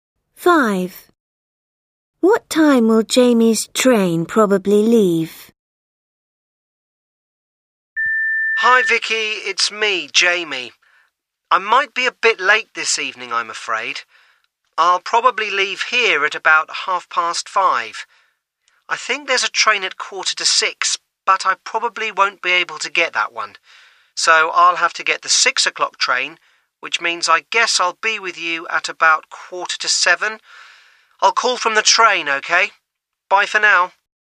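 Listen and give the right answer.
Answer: 6 o'clock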